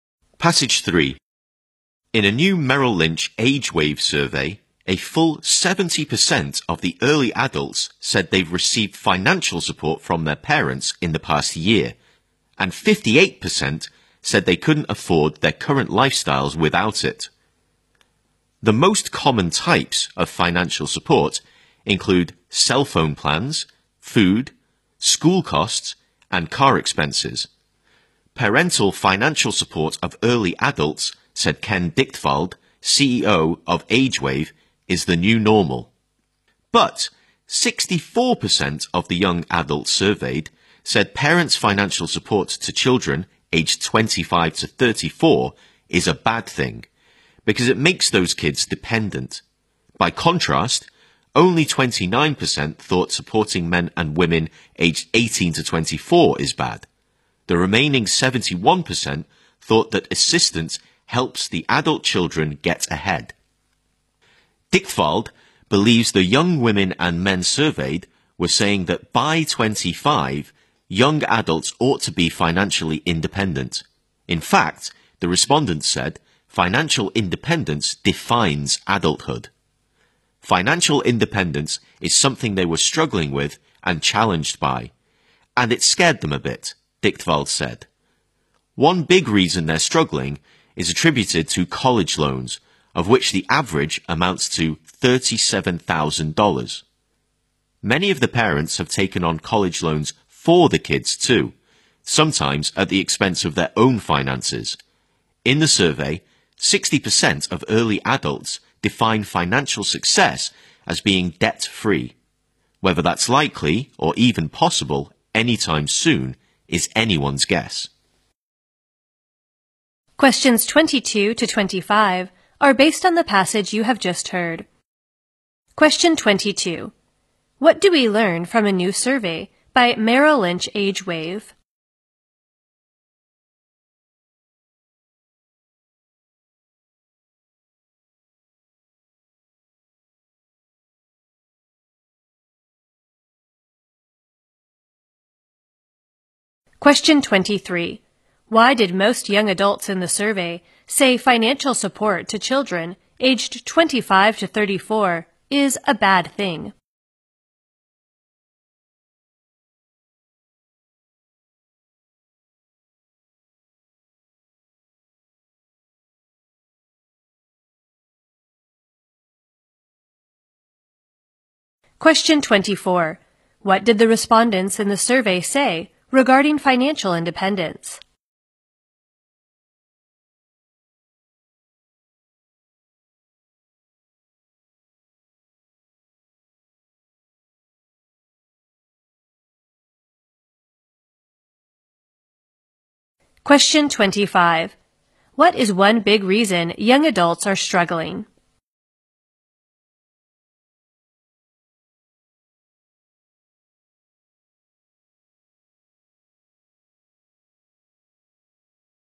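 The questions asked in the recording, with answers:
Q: Why did most young adults in the survey say financial support to children aged 25 to 34 is a bad thing?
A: It makes them dependent

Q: What did the respondents in the survey say regarding financial independence?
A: It defines adulthood

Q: What is one big reason young adults are struggling?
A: College loans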